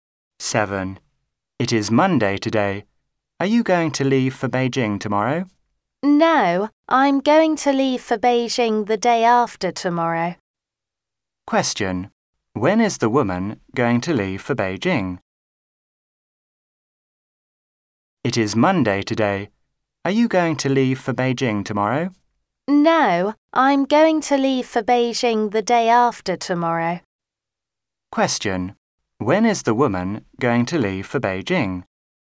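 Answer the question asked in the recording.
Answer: On Wednesday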